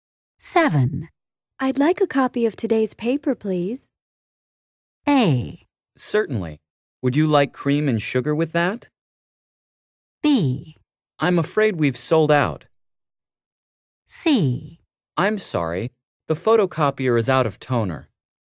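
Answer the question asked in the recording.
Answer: B: I'm afraid we've sold out.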